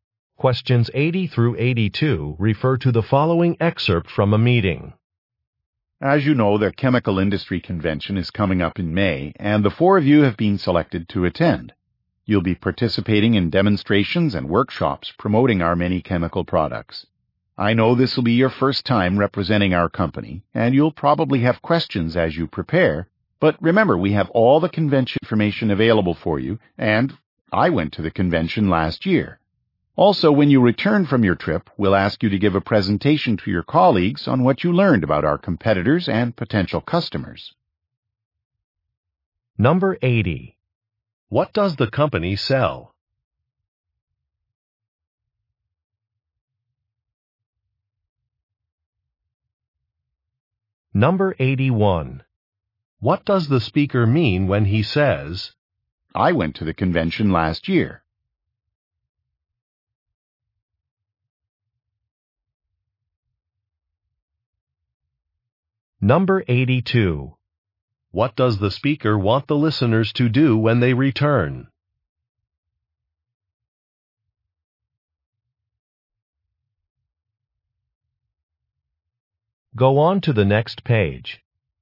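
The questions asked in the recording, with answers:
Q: What does the company sell?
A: Chemical products

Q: What does the speaker want the listeners to do when they return?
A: Give a presentation to colleagues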